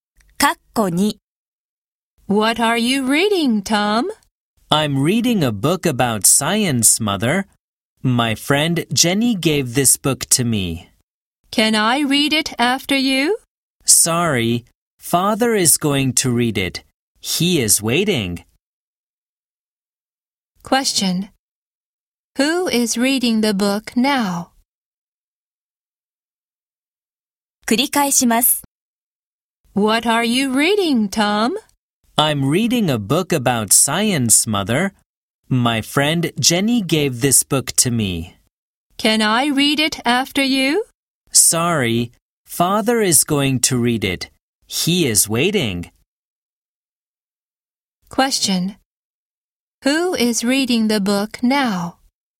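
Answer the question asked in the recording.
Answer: Tom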